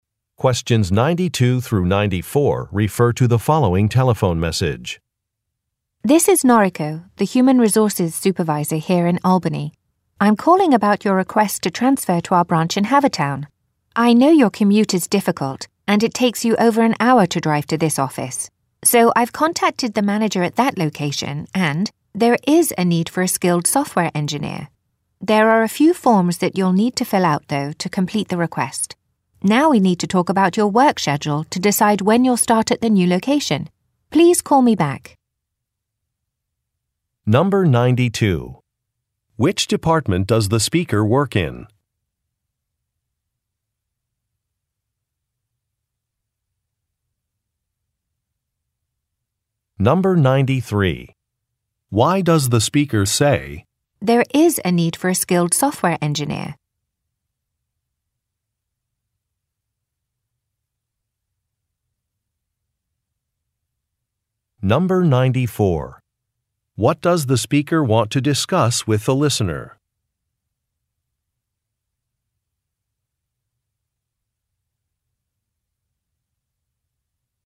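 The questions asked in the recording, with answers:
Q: Which department does the speaker work in?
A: Human Resources

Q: What does the speaker want to discuss with the listener?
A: The listener's work schedule (when to start at the new location)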